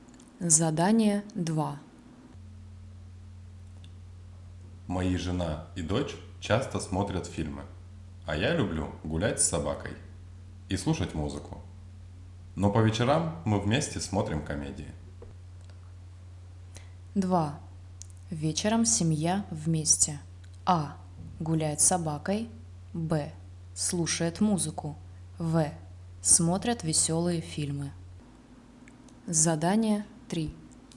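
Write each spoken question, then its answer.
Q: Вечером семья вместе. А. Гуляет с собакой. Б. Слушает музыку. В. Смотрят веселые фильмы.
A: В: смотрят веселые фильмы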